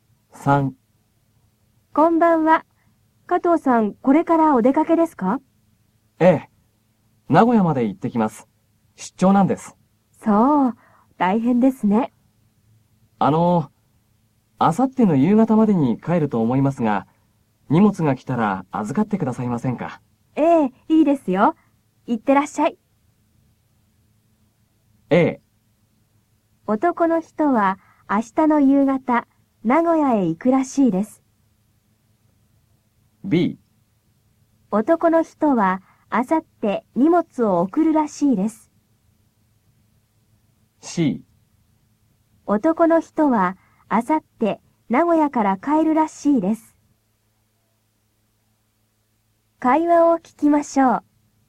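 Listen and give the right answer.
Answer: C: 男の人は明後日名古屋から帰るらしいです。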